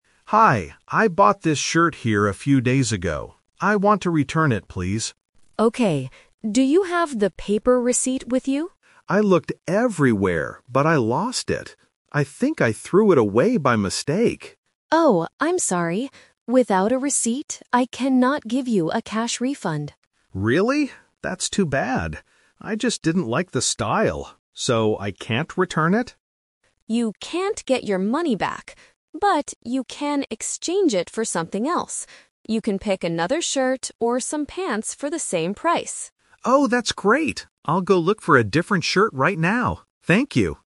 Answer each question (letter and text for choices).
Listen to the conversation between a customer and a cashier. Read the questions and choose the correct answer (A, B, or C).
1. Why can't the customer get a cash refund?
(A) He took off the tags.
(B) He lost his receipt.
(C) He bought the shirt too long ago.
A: (B) He lost his receipt.

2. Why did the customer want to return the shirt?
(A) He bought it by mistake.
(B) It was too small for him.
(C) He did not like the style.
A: (C) He did not like the style.

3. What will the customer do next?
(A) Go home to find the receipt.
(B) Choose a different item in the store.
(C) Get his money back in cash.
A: (B) Choose a different item in the store.

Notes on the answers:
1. The customer explicitly states, "I looked everywhere, but I lost it." The cashier then confirms he cannot get a refund without it.
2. The customer says his reason clearly: "I just didn't like the style."
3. This is the "Twist." Because he cannot get a refund, he accepts the exchange and says, "I'll go look for a different shirt right now."

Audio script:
Customer: Hi, I bought this shirt here a few days ago. I want to return it, please.
Cashier: Okay. Do you have the paper receipt with you?
Customer: I looked everywhere, but I lost it. I think I threw it away by mistake.
Cashier: Oh, I'm sorry. Without a receipt, I cannot give you a cash refund.
Customer: Really? That's too bad. I just didn't like the style. So I can't return it?
Cashier: You can't get your money back. But, you can exchange it for something else. You can pick another shirt or some pants for the same price.